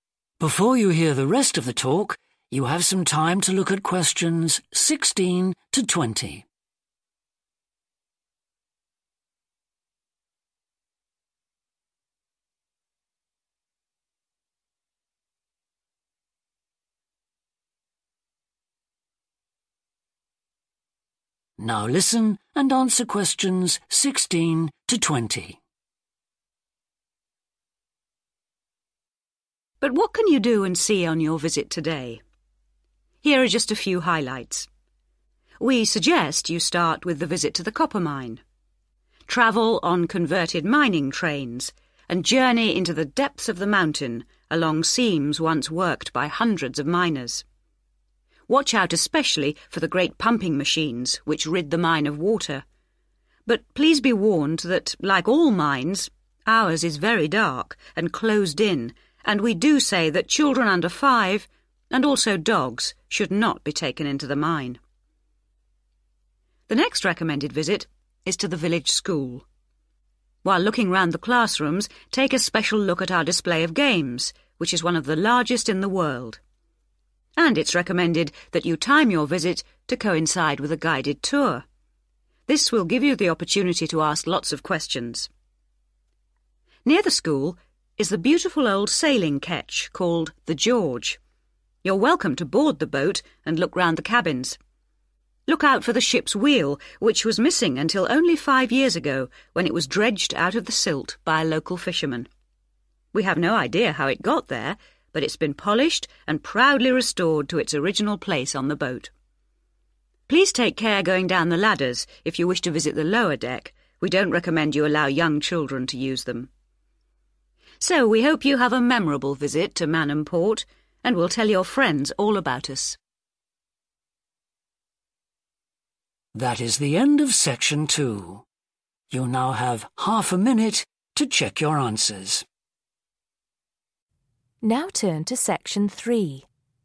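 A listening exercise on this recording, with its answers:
Write NO MORE THAN TWO WORDS for each answer. Complete the table below.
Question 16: Specially adapted miners' 16................... take visitors into the mountain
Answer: trains

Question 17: the mine is 17.................... and enclosed — unsuitable for children and animals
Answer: dark

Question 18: classrooms and a special exhibition of 18.....................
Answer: games

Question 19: 19................... is recommended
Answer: guided tour

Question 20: children shouldn't use the 20.............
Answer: ladders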